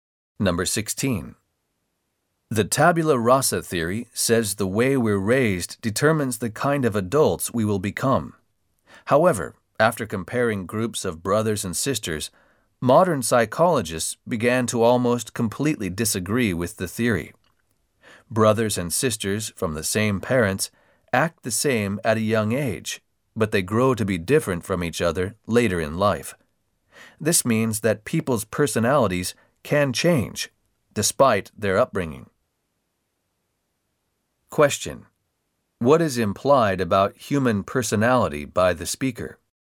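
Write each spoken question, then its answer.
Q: What is implied about human personality by the speaker?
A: It can change despite upbringing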